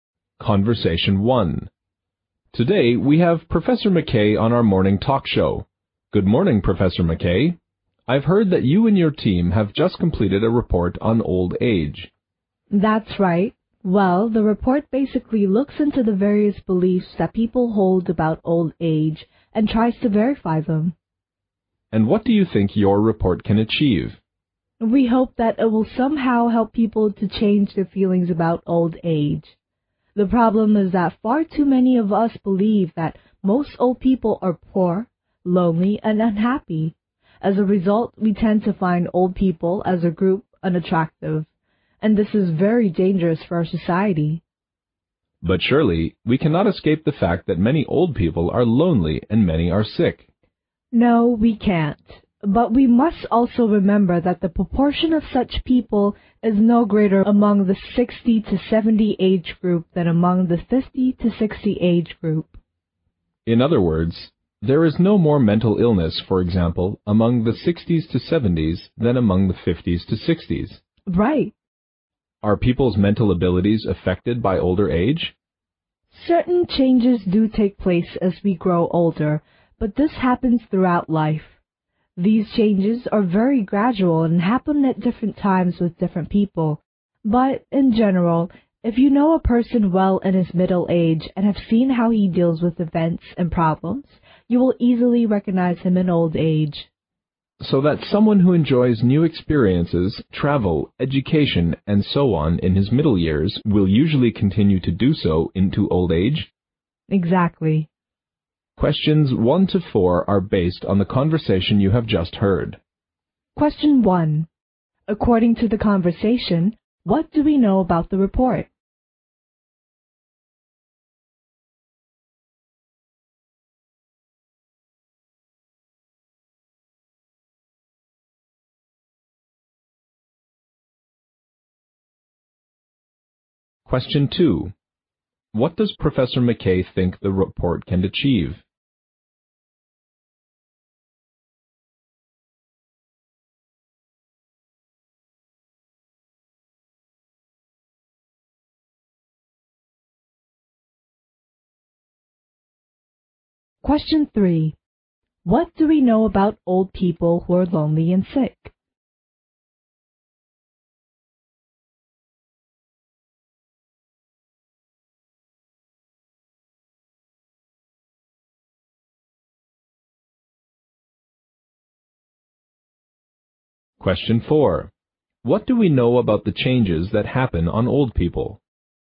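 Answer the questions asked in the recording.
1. It looks into people's beliefs about old age and tries to verify them.
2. Help people change their feelings about old age.
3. Their proportion is no greater among 60-70 year olds than among 50-60 year olds.
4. They are very gradual and happen at different times with different people.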